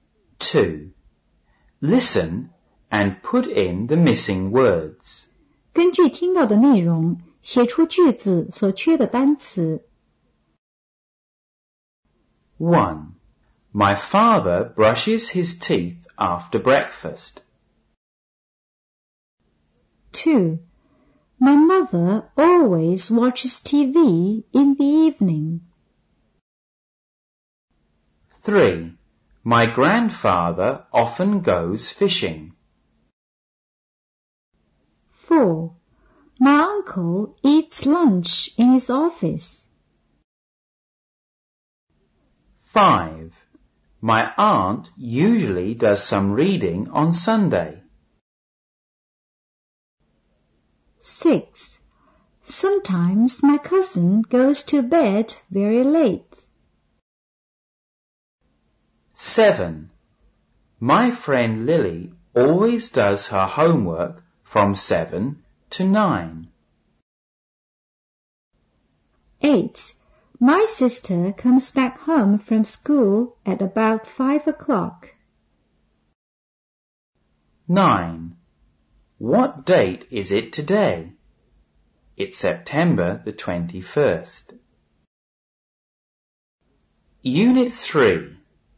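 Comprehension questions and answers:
2.Listen and put in the missing words.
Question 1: My father ( ) his ( ) after breakfast.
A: brushes; teeth

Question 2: My mother ( ) TV in the evening.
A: always watches

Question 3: My grandfather ( ) fishing.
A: often goes

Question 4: My uncle ( ) in his office.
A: eats lunch

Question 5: My aunt ( ) some reading on Sunday.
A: usually does

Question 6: ( ) my cousin ( ) to bed very late.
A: Sometimes; goes

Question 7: My friend Lily ( ) ( ) her homework from 7:00 to 9:00.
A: always does

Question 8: My sister ( ) ( ) home from school at about 5:00.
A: comes back

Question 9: What ( ) is it today ? It's ( ) the 21st.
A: date; September

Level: 五年级上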